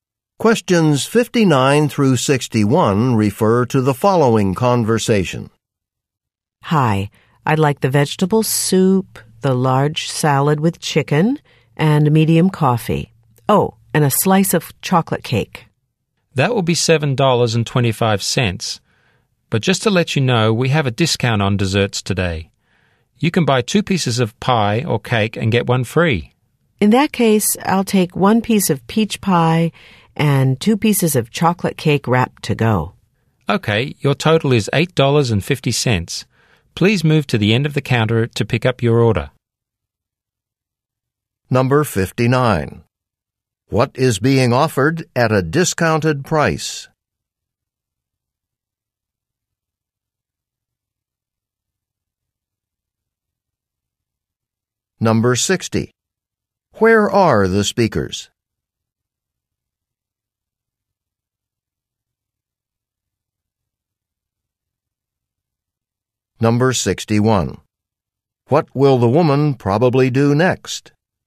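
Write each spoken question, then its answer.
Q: What is being offered at a discounted price?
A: Desserts

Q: Where are the speakers?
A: In a restaurant or café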